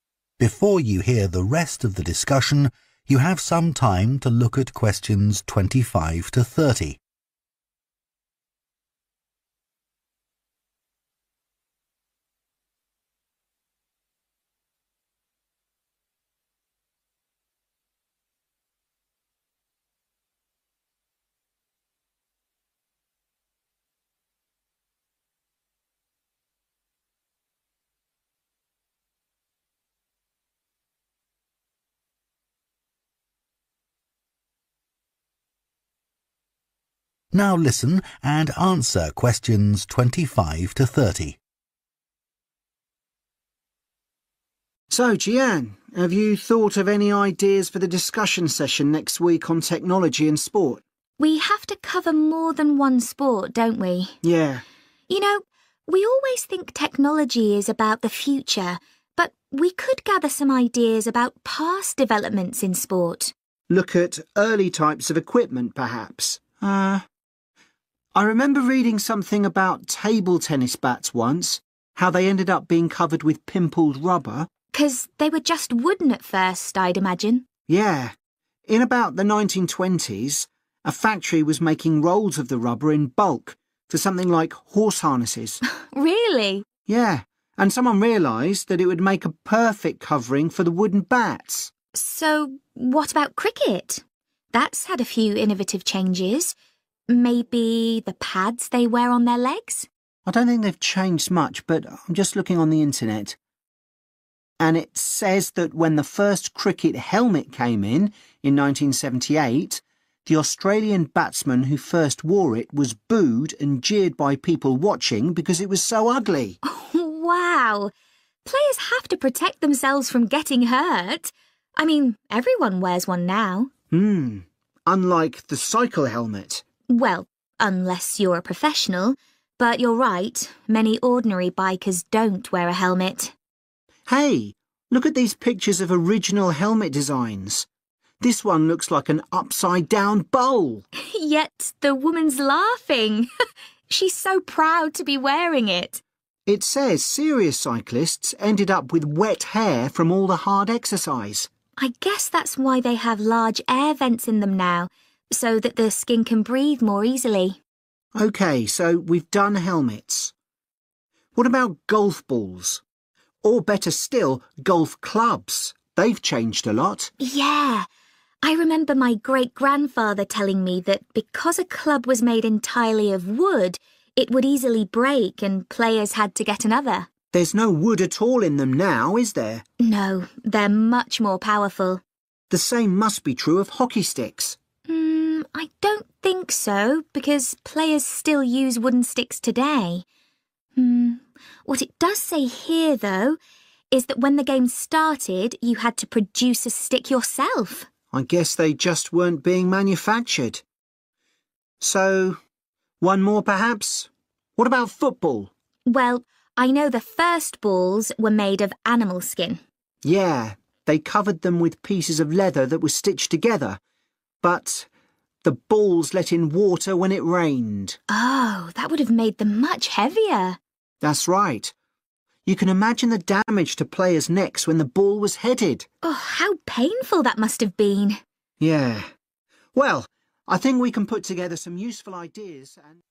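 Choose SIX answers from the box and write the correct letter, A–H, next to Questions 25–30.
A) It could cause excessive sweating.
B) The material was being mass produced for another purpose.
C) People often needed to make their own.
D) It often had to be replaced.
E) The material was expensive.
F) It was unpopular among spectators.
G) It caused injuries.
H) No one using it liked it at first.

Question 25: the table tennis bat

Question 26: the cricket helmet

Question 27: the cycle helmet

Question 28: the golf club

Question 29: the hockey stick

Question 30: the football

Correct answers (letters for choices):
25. B
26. F
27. A
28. D
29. C
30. G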